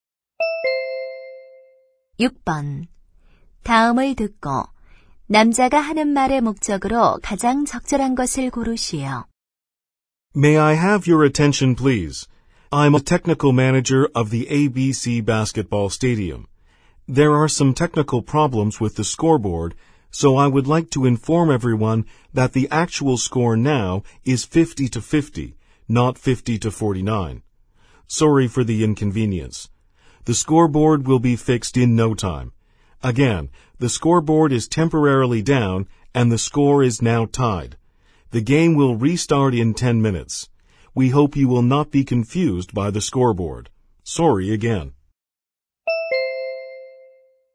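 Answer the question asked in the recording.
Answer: 전광판 고장으로 실제 점수(50-50 동점)를 알리기 위해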